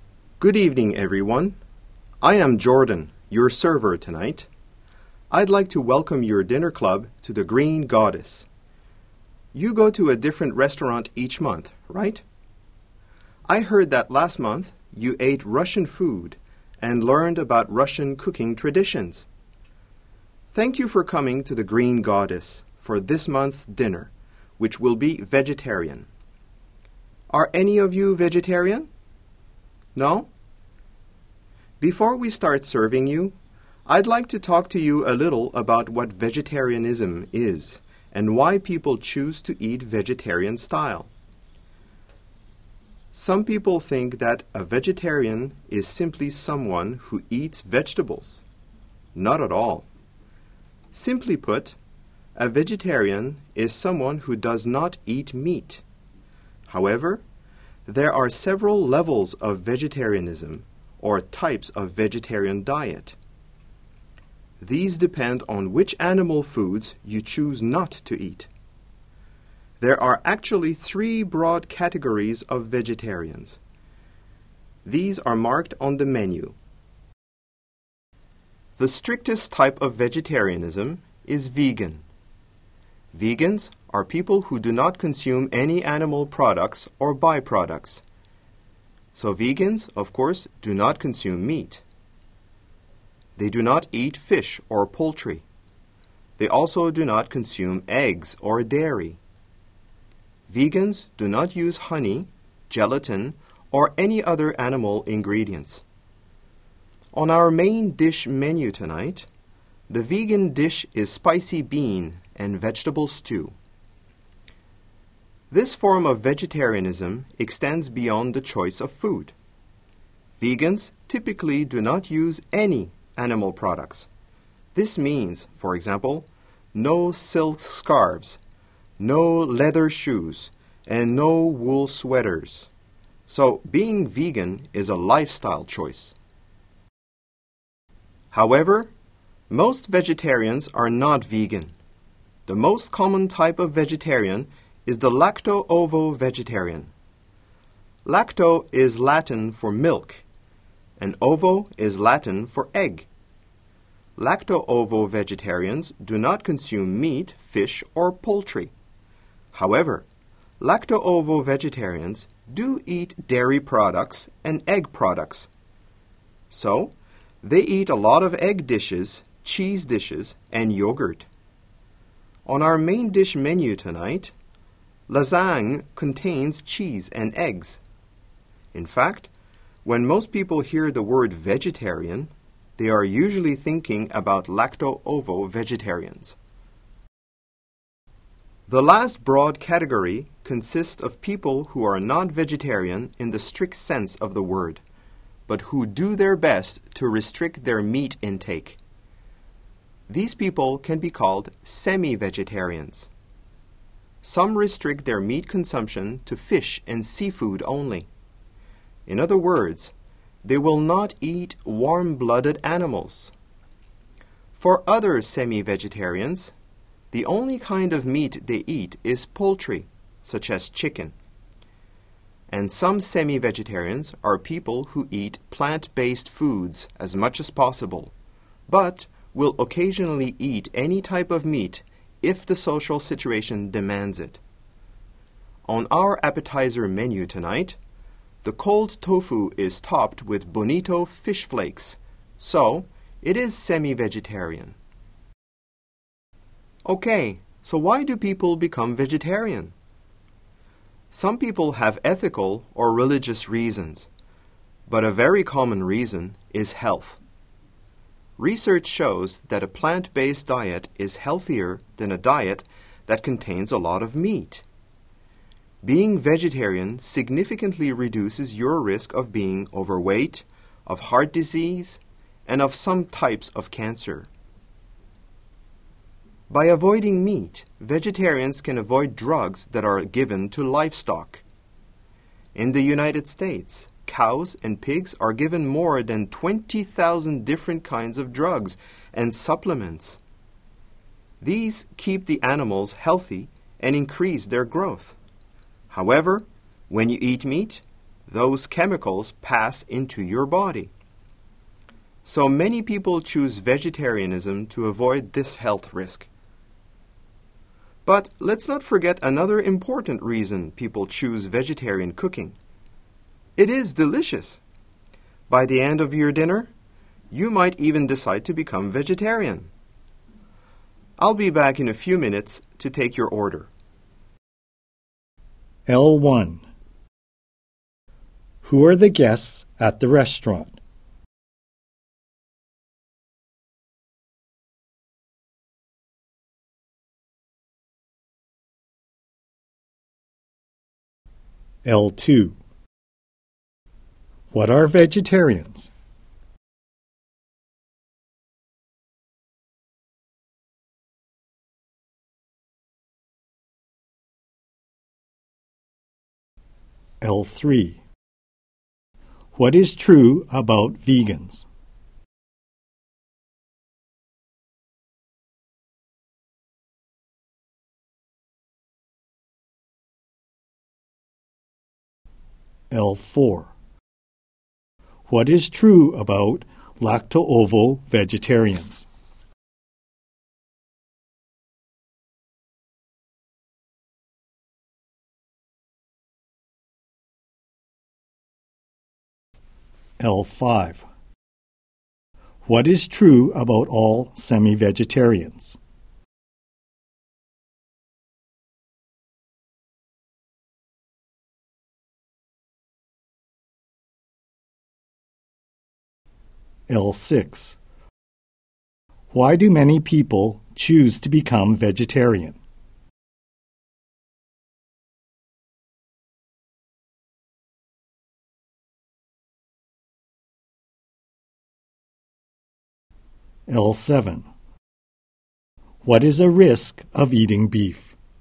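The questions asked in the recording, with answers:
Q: Who are the guests at the restaurant?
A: Members of a dinner club that visits a different restaurant each month

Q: What are vegetarians?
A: People who do not eat meat

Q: What is true about vegans?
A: They do not consume or use any animal products

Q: What is true about lacto-ovo vegetarians?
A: They eat dairy and eggs but no meat, fish or poultry

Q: What is true about all semi-vegetarians?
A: They restrict their meat intake

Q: Why do many people choose to become vegetarian?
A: For their health

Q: What is a risk of eating beef?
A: Drugs given to livestock pass into your body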